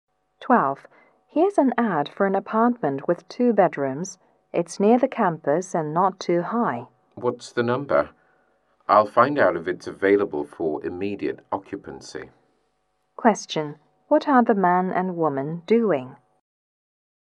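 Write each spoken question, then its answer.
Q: What are the man and woman doing?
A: Looking for an apartment to rent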